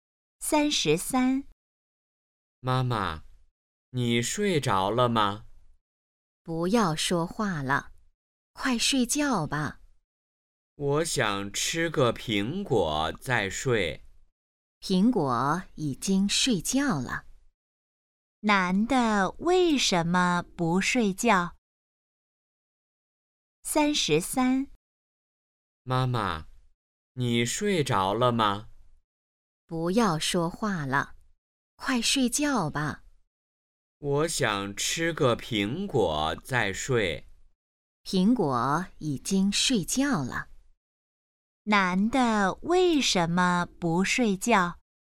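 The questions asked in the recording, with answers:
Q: 男的为什么不睡觉?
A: 想吃个苹果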